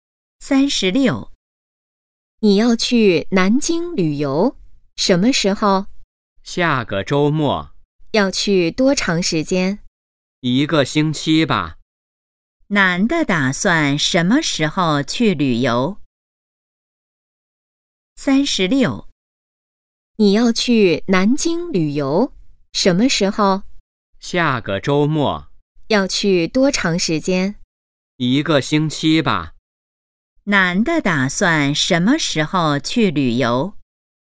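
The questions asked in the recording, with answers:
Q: 男的打算什么时候去旅游?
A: 下个周末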